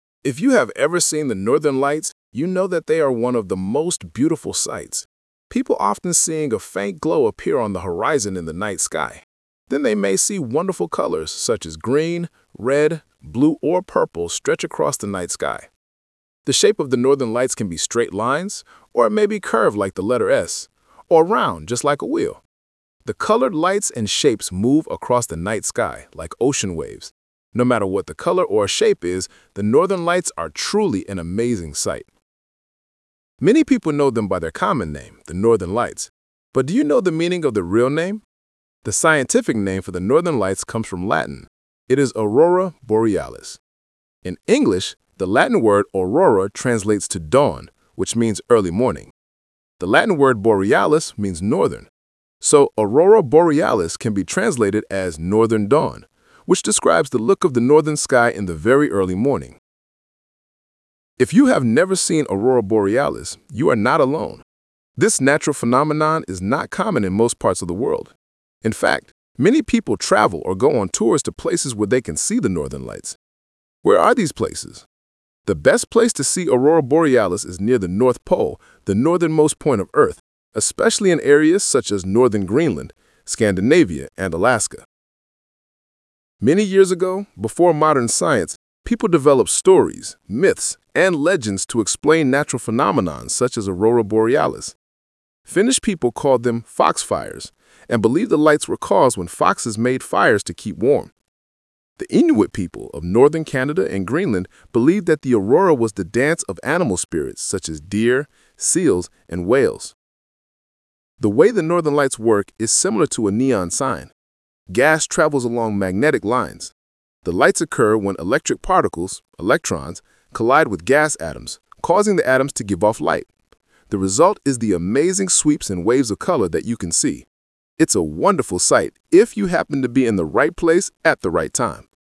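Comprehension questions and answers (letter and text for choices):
Talk/Lecture 3: Listen to a woman talking about northern lights.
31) Which is NOT the shape of the northern lights?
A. a straight line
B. a curved line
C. a round shape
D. an oval shape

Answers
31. D. an oval shape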